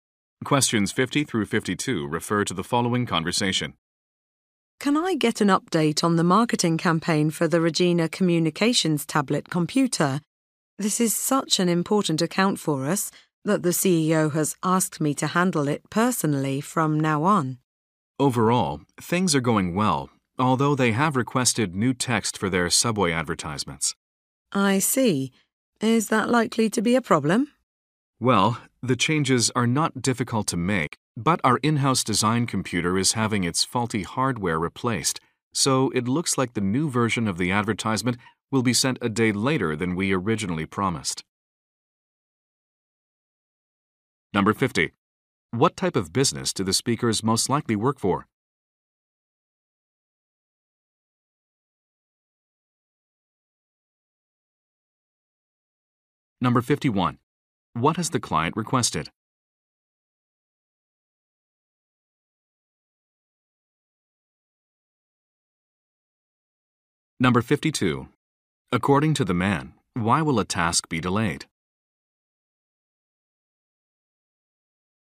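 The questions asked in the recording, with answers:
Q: What type of business do the speakers most likely work for?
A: A marketing or advertising agency

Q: What has the client requested?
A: New text for their subway advertisements

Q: According to the man, why will a task be delayed?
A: The design computer's faulty hardware is being replaced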